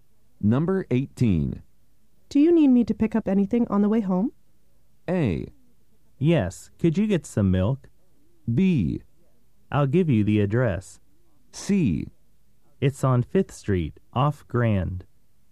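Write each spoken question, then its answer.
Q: Do you need me to pick up anything on the way home?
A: A: Yes, could you get some milk?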